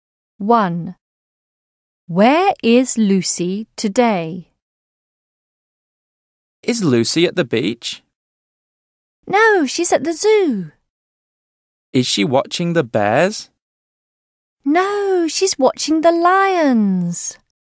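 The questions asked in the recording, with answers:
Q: Where is Lucy today?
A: At the zoo, watching the lions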